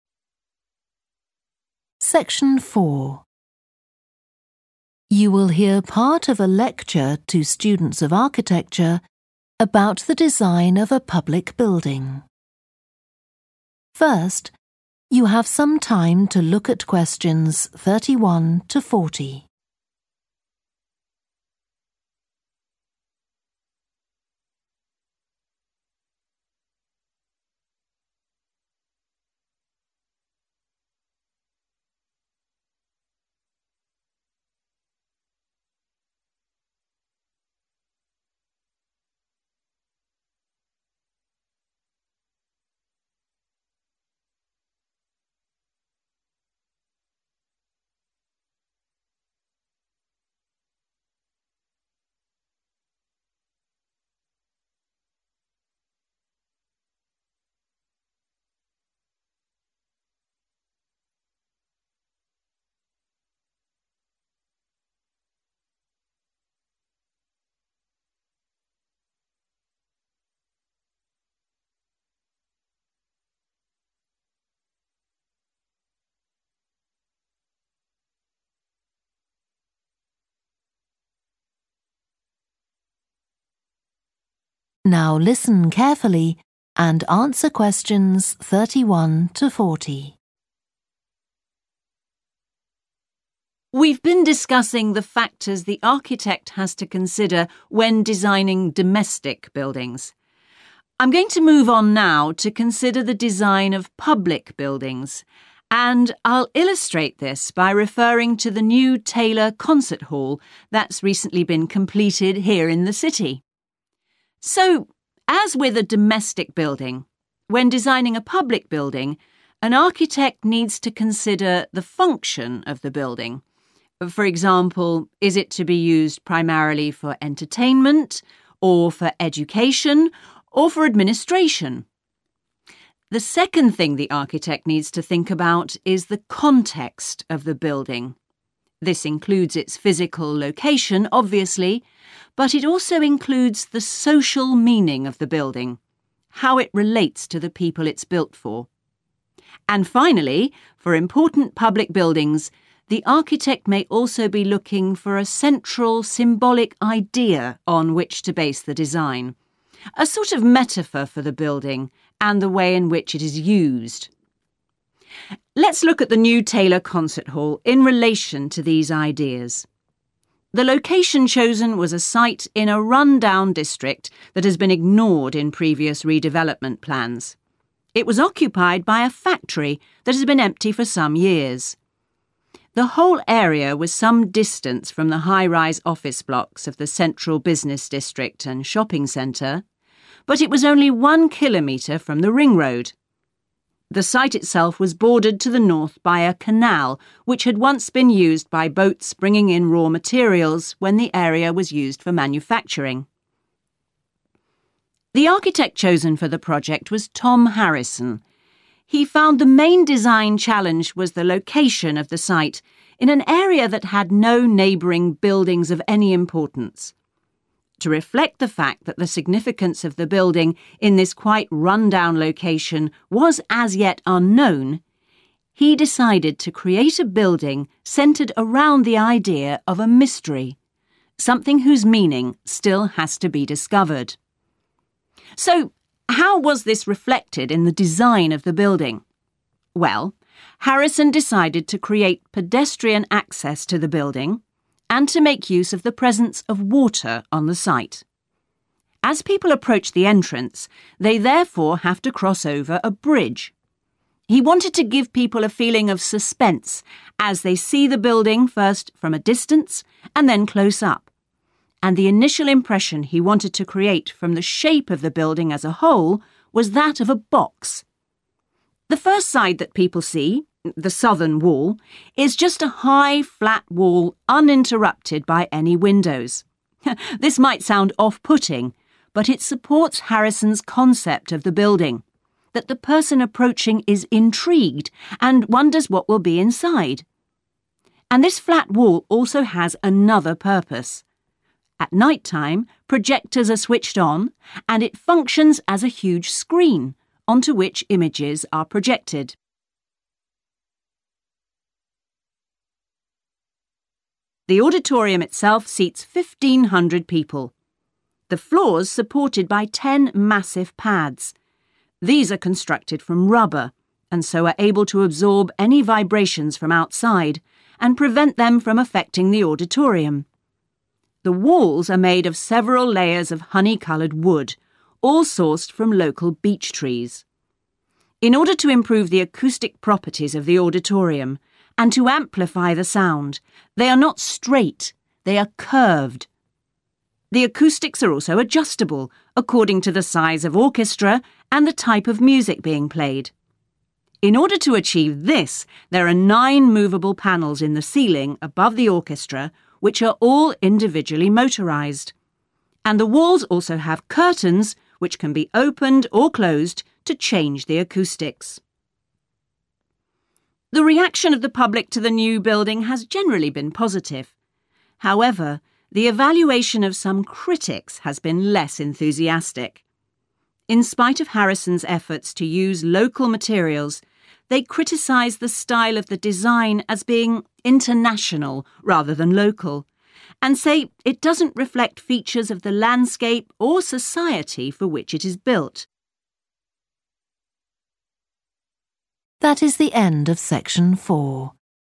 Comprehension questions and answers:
Complete the notes below. Write ONE WORD ONLY for each answer.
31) physical and 31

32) On the site of a disused 32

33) Beside a 33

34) It's approached by a 34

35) The building is the shape of a 35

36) One exterior wall acts as a large 36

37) the floor is built on huge pads made of 37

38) the walls are made of local wood and are 38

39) ceiling panels and 39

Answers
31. social
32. factory
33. canal
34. bridge
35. box
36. screen
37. rubber
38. curved
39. curtains

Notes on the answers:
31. The transcript says that when designing a building, the designer needs to think about not just where the building is located, but also how the building is important to the community and the people around it. Answer Explanation: The answer 'social' means it is related to people and their connections with each other in their community. Reason For Correctness: The correct answer is 'social' because the transcript mentions that the designer must consider the 'social meaning' of the building, which is how it relates to the people it serves.
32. The transcript talks about how the location chosen for the Concert Hall was in a neglected area, specifically on the grounds of a building that had not been in use for some time. Answer Explanation: The answer 'factory' refers to a type of building where goods are manufactured. In this context, it means that the Concert Hall was built on the abandoned site of a place where items were produced or assembled. Reason For Correctness: The correct answer is 'factory' because the excerpt explicitly mentions that the site was previously occupied by a factory that was abandoned, fitting the description of a manufacturing facility.
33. The transcript talks about a location that was next to a man-made waterway. Answer Explanation: The answer refers to a man-made waterway that is used for transportation of goods or water. In this context, it's like a river. Reason For Correctness: The correct answer matches the description in the excerpt where it mentions a 'canal' as a waterway bordering the location. A canal is a man-made waterway constructed for navigation, water supply, or drainage, which fits the context provided.
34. The transcript describes how people approach the building by crossing a bridge. Answer Explanation: The answer 'bridge' refers to a structure that allows people to cross over obstacles such as water, roads, or in this case, approach a building. Reason For Correctness: The correct answer is 'bridge' because it fits the context of people approaching the building and having to cross over a structure, as described in the excerpt.
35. The transcript says that the designer wanted the building to look like a box when you see it for the first time. Answer Explanation: The answer 'box' means the building is shaped like a box. Reason For Correctness: The correct answer 'box' is right because the excerpt says the designer wanted the building to look like a box when you first see it. This means the shape of the building is like a box.
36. The transcript talks about a specific function of a flat wall in the building. It mentions that projectors are used at night to display images on this flat wall, making it like a large screen. Answer Explanation: The answer 'screen' refers to a surface where images or videos can be projected and displayed for viewing. Reason For Correctness: The correct answer is 'screen' because the excerpt clearly describes the building's flat wall being utilized as a screen where images are projected at night, showcasing its versatility and functionality beyond just being a regular wall.
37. The transcript says that the floor of the concert hall is held up by ten big pads. These pads are made from a material called rubber. Answer Explanation: The answer is 'rubber', which is a stretchy and strong material often used in many products. Reason For Correctness: The correct answer is 'rubber' because the transcript specifically mentions that the massive pads supporting the floor are constructed from rubber.
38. The transcript means that the walls are not straight but instead have a rounded or curved shape. Answer Explanation: The answer 'curved' means not straight or having a bend, like a curve. Reason For Correctness: The correct answer is 'curved' because it accurately describes the shape of the walls in the building as mentioned in the excerpt, which states that the walls are not straight but rather curved.
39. The transcript mentions that there are curtains on the walls that can be opened or closed to change the acoustics in the auditorium. Answer Explanation: The answer indicates that the correct word to fill in the blank is 'curtains,' which are fabric pieces that can be used to cover windows or in this case, decorate the walls. Reason For Correctness: The correct answer is 'curtains' because the word describes a feature in the auditorium that allows adjustment of acoustics by opening or closing them. This aligns with the function of curtains, which can help control sound reflection and absorption in a space like an auditorium.

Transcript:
We've been discussing the factors the architect has to consider when designing domestic buildings. I'm going to move on now to consider the design of public buildings, and I'll illustrate this by referring to the new Taylor Concert Hall that's recently been completed here in the city.
So, as with a domestic building, when designing a public building, an architect needs to consider the function of the building – for example, is it to be used primarily for entertainment, or for education, or for administration? The second thing the architect needs to think about is the context of the building, this includes its physical location obviously, but it also includes the social meaning of the building how it relates to the people it's built for. And finally, for important public buildings, the architect may also be looking for a central symbolic idea on which to base the design, a sort of metaphor for the building and the way in which it is used.
Let's look at the new Taylor Concert Hall in relation to these ideas. The location chosen was a site in a run-down district that has been ignored in previous redevelopment plans. It was occupied by a factory that had been empty for some years. The whole area was some distance from the high-rise office blocks of the central business district and shopping centre, but it was only one kilometre from the ring road. The side itself was bordered to the north by a canal which had once been used by boats bringing in raw materials when the area was used for manufacturing.
The architect chosen for the project was Tom Harrison. He found the main design challenge was the location of the site in an area that had no neighbouring buildings of any importance. To reflect the fact that the significance of the building in this quite run-down location was as yet unknown, he decided to create a building centred around the idea of a mystery – something whose meaning still has to be discovered.
So how was this reflected in the design of the building? Well, Harrison decided to create pedestrian access to the building and to make use of the presence of water on the site. As people approach the entrance, they therefore have to cross over a bridge. He wanted to give people a feeling of suspense as they see the building first from a distance, and then close-up, and the initial impression he wanted to create from the shape of the building as a whole was that of a box. The first side that people see, the southern wall, is just a high, flat wall uninterrupted by any windows. This might sound off-putting, but it supports Harrison's concept of the building – that the person approaching is intrigued and wonders what will be inside. And this flat wall also has another purpose. At night-time, projectors are switched on and it functions as a huge screen, onto which images are projected.
The auditorium itself seats 1500 people. The floor's supported by ten massive pads. These are constructed from rubber, and so are able to absorb any vibrations from outside and prevent them from affecting the auditorium. The walls are made of several layers of hony-coloured wood, all sourced from local beech trees. In order to improve the acoustic properties of the auditorium and to amplify the sound, they are not straight, they are curved. The acoustics are also adjustable according to the size of orchestra and the type of music being played. In order to achieve this, there are nine movable panels in the ceiling above the orchestra which are all individually motorized, and the walls also have curtains which can be opened or closed to change the acoustics.
The reaction of the public to the new building has generally been positive. However, the evaluation of some critics has been less enthusiastic. In spite of Harrison's efforts to use local materials, they criticise the style of the design as being international rather than local, and say it doesn't reflect features of the landscape or society for which it is built.